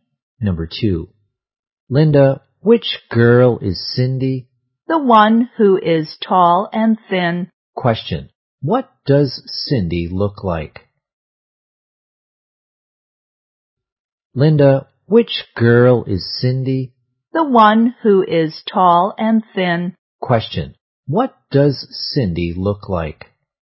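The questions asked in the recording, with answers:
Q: what does Cindy look like?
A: Tall and thin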